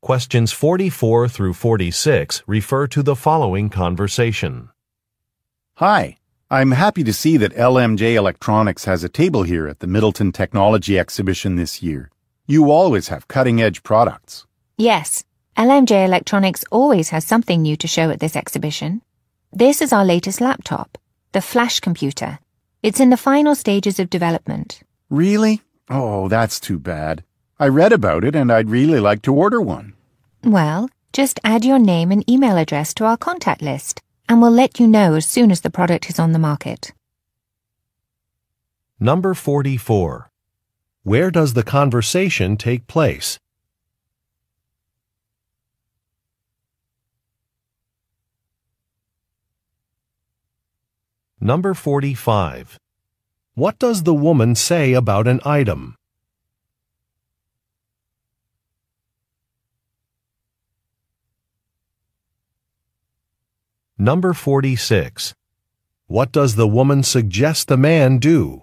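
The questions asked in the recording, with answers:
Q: Where does the conversation take place?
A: At a technology exhibition (the Middleton Technology Exhibition)

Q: What does the woman say about an item?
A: It is still in development and not yet available

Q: What does the woman suggest the man do?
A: Add his name and email address to a contact list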